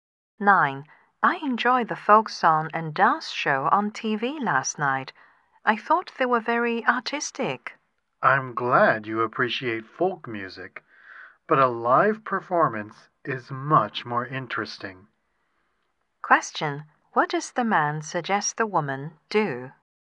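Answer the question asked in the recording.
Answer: Go to a live performance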